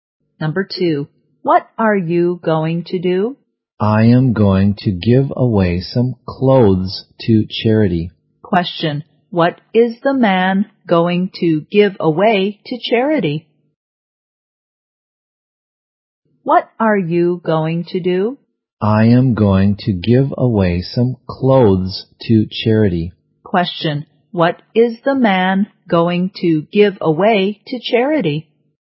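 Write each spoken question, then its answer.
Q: what is the man going to give away to charity?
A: Some clothes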